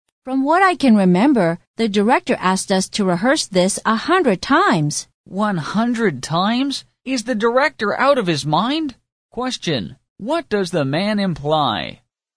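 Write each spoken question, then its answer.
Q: what does the man imply?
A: The director is unreasonable; rehearsing 100 times is far too many.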